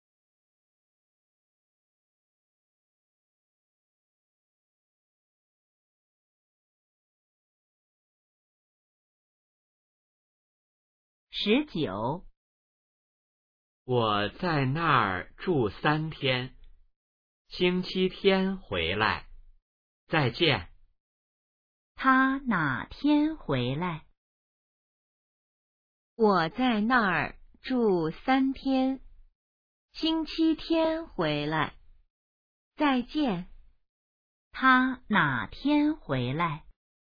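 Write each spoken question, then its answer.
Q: 他哪天回来?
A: 星期天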